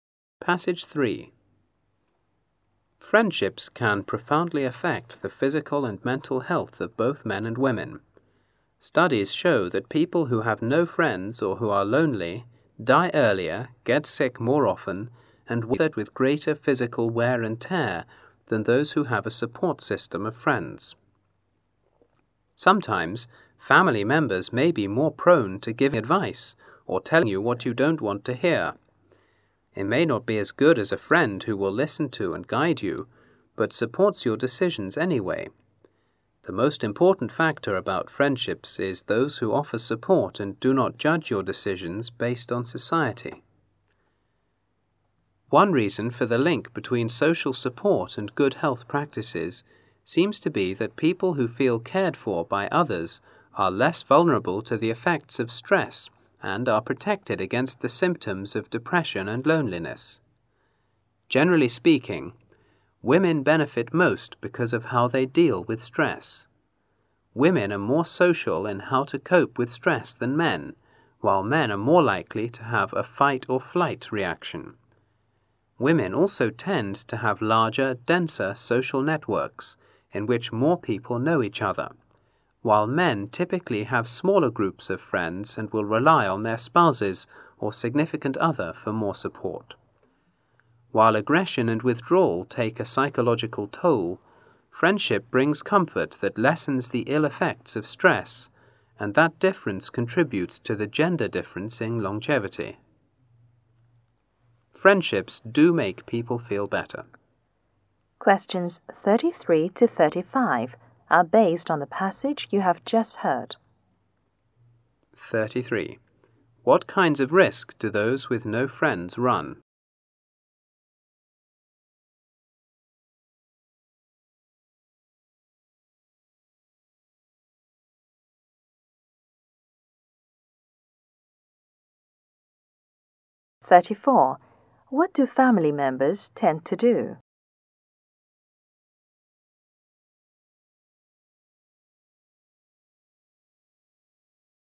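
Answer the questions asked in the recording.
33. Dying earlier, getting sick more often and more physical wear and tear
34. Give advice or tell you what you don't want to hear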